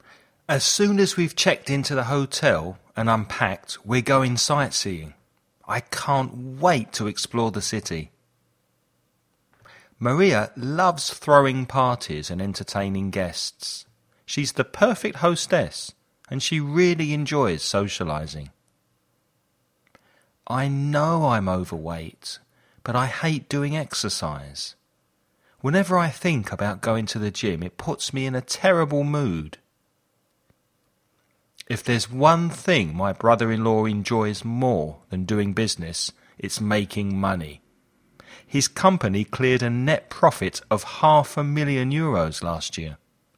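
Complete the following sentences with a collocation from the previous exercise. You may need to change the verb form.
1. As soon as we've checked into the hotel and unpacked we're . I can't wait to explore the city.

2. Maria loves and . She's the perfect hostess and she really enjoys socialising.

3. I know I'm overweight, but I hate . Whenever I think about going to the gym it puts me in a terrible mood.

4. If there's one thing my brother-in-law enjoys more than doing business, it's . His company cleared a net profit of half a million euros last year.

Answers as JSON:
{"1": "going sightseeing", "2": "throwing parties; entertaining guests", "3": "doing exercise", "4": "making money"}

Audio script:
As soon as we've checked into the hotel and unpacked we're . I can't wait to explore the city.
Maria loves and . She's the perfect hostess and she really enjoys socialising.
I know I'm overweight, but I hate . 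Whenever I think about going to the gym it puts me in a terrible mood.
If there's one thing my brother-in-law enjoys more than doing business, it's .

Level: Intermedio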